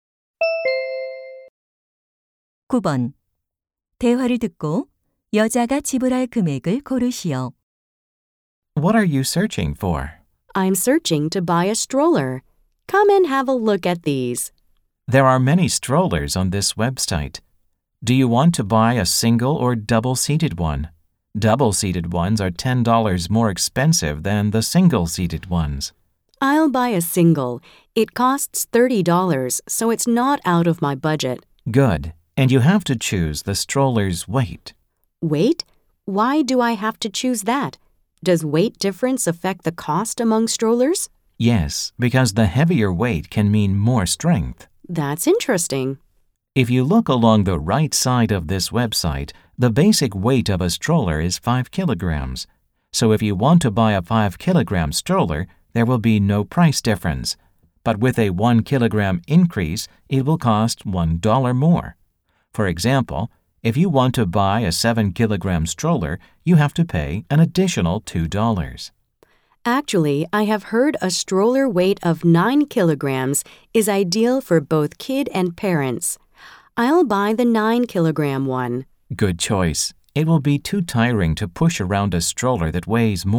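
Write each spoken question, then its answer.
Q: 대화를 듣고 여자가 지불할 금액을 고르시오.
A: 34달러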